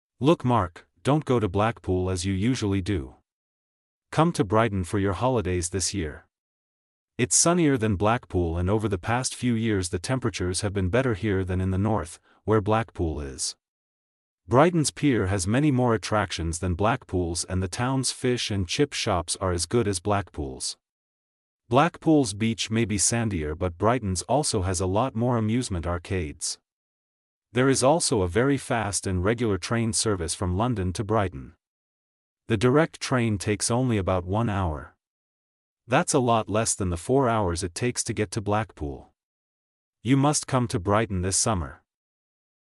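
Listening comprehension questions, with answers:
True or False?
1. Blackpool is sunnier than Brighton.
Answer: False

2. Blackpool is in the North.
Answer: True

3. Brighton has a lot more amusement arcades than Blackpool.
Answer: True

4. It takes four hours to get to Brighton by train.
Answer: False

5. It seems that Mark sends this letter to a friend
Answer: False

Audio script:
Look, Mark, don't go to Blackpool as you usually do. Come to Brighton for your holidays this year. It's sunnier than Blackpool and over the past few years the temperatures have been better here than in the North, where Blackpool is. Brighton's pier has many more attractions than Blackpool's and the town's fish and chip shops are as good as Blackpool's. Blackpool's beach may be sandier but Brighton's also has a lot more amusement arcades. There is also a very fast and regular train service from London to Brighton. 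The direct train takes only about 1 hour. That's a lot less than the 4 hours it takes to get to Blackpool. You must come to Brighton this summer!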